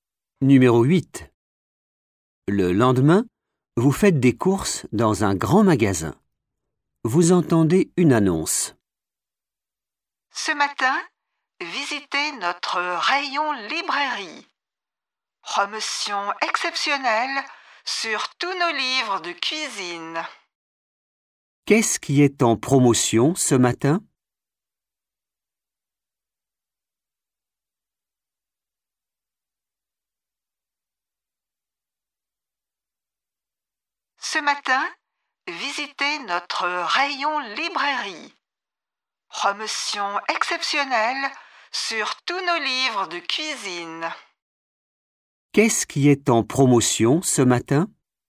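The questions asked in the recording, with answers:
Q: Qu'est-ce qui est en promotion ce matin ?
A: Les livres de cuisine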